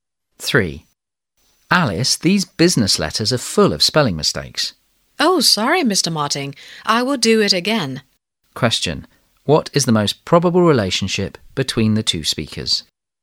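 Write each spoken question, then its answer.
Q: Question: What is the most probable relationship between the two speakers?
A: Boss and secretary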